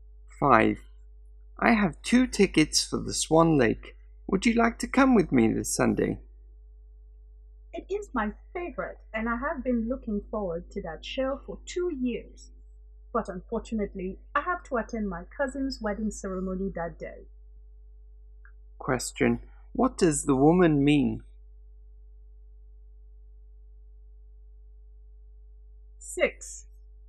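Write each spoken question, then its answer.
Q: what does the woman mean?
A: She can't go to Swan Lake with him because of her cousin's wedding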